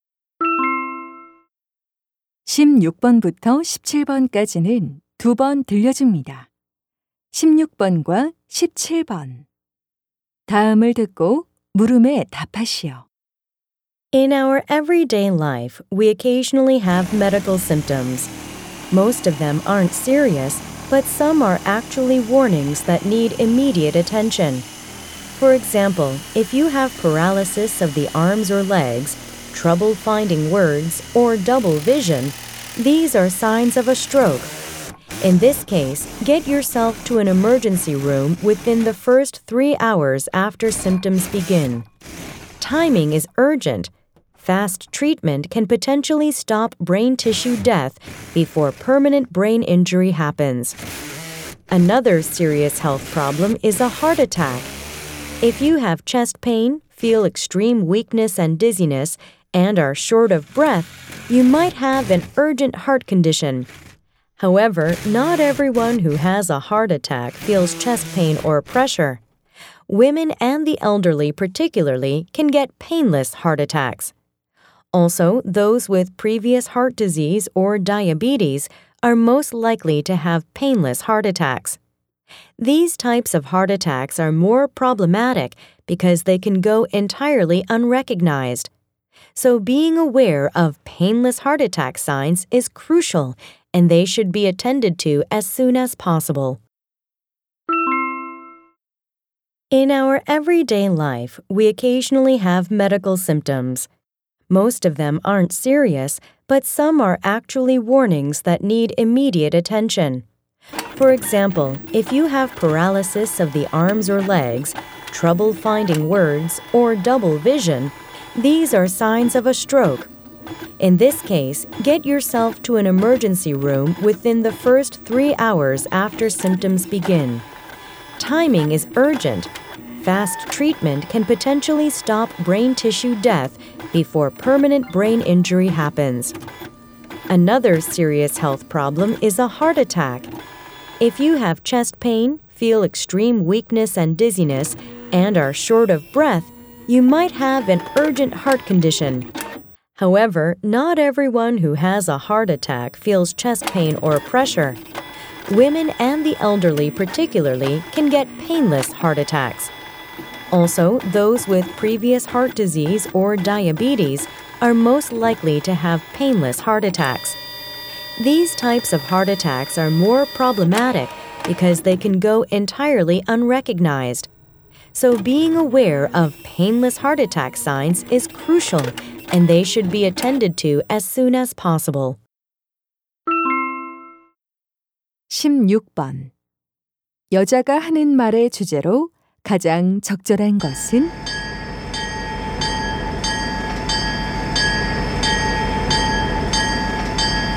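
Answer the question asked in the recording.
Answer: 즉시 치료가 필요한 위험한 증상들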